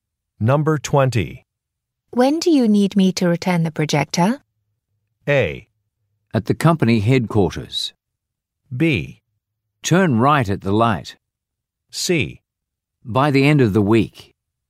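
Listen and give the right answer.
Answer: C: By the end of the week.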